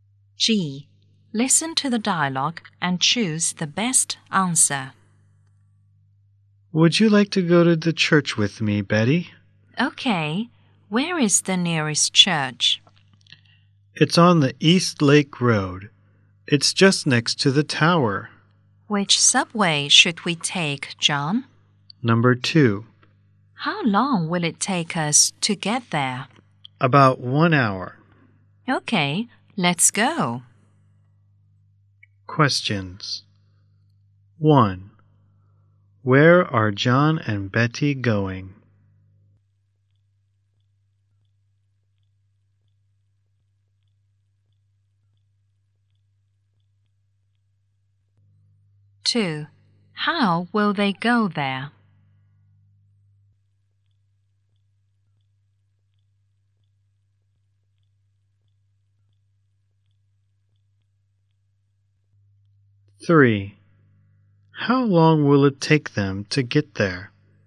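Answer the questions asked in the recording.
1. To the church
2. By subway Number 2
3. About 1 hour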